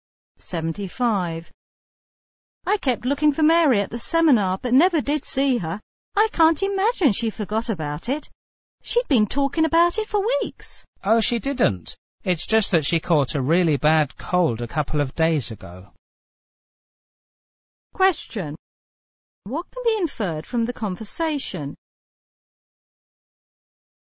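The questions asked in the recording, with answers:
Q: What can be inferred from the conversation?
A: Mary missed the seminar because she was sick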